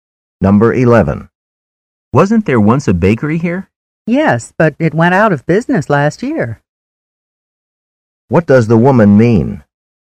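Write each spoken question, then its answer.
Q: What does the woman mean?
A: The bakery closed last year.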